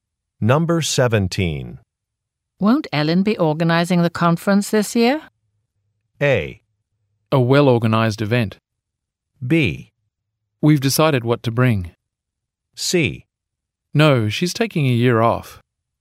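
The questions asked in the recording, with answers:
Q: Won't Ellen be organizing the conference this year?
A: C: No, she's taking a year off.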